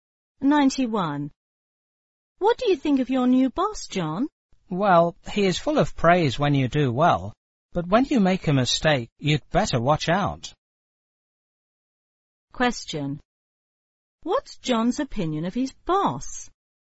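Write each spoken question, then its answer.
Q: What's John's opinion of his boss?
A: The boss praises good work but is strict about mistakes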